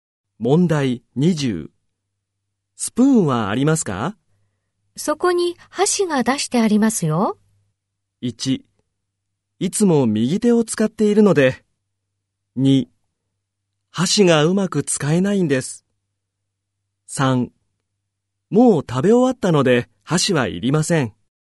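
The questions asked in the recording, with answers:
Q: スプーンはありますか?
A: 2: 箸がうまく使えないんです。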